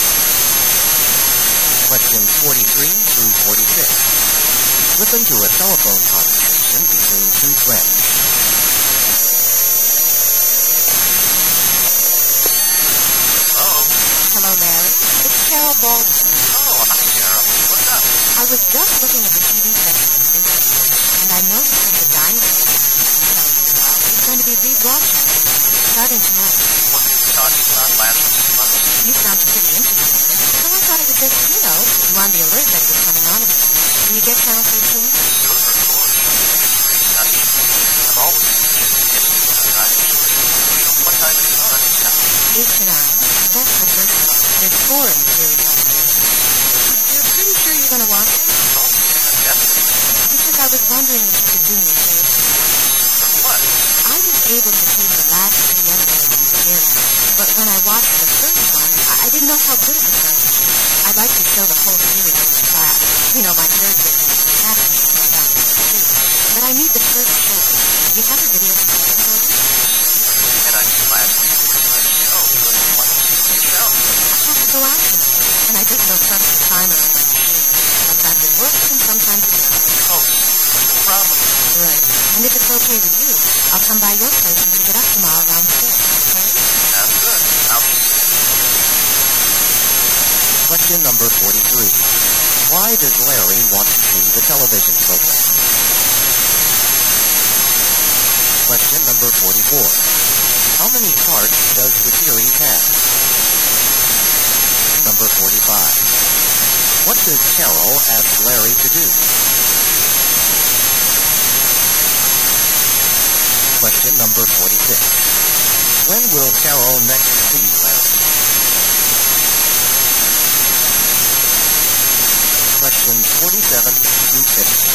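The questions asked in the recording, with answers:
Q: How many parts does the series have?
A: Four

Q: What does Cheryl ask Larry to do?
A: Record the first show for her

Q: When will Cheryl next see Larry?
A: Tomorrow around 6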